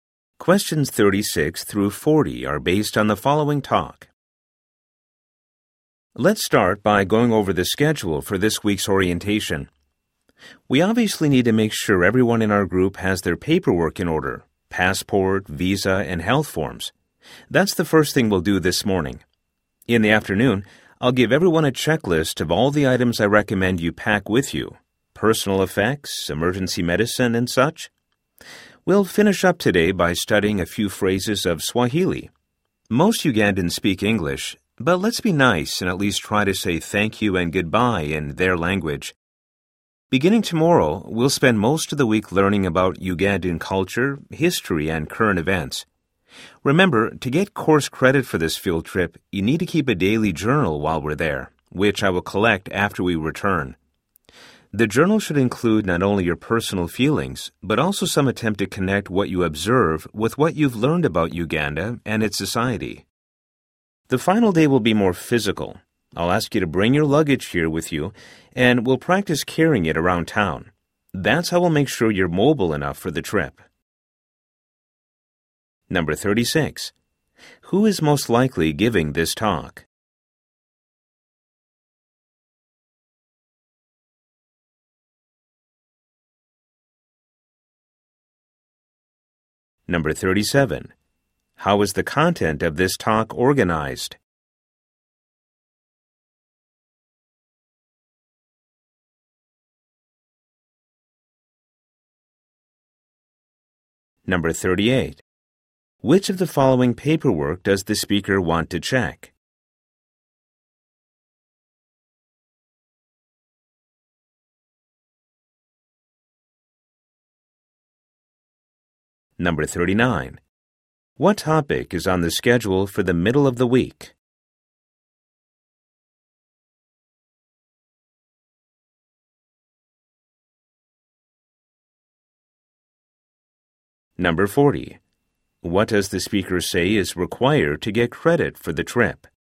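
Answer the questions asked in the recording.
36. A teacher leading a field trip
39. Ugandan culture, history, and current events
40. Keeping a daily journal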